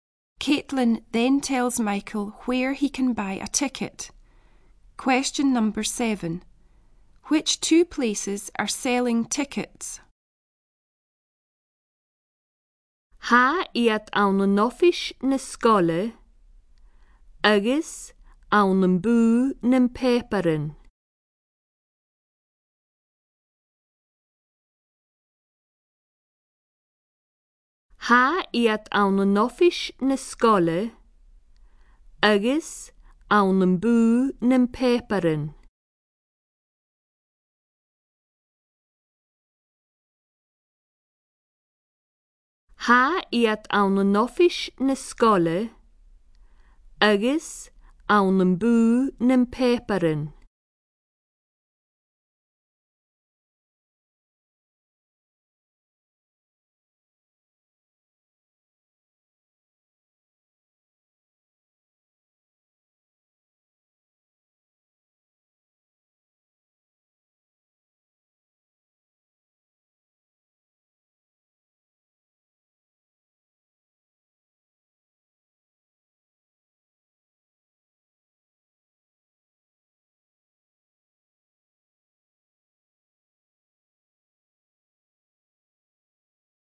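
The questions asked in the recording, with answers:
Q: Which two places are selling tickets?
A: The school office and the newspaper shop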